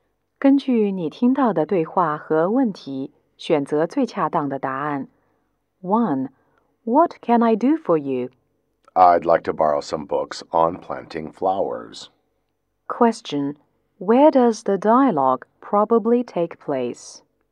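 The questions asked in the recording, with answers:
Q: Where does the dialogue probably take place?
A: In a library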